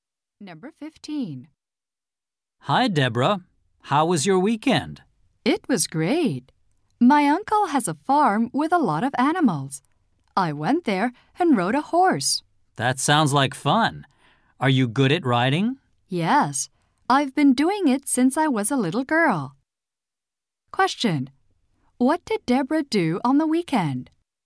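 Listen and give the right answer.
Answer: She rode a horse at her uncle's farm.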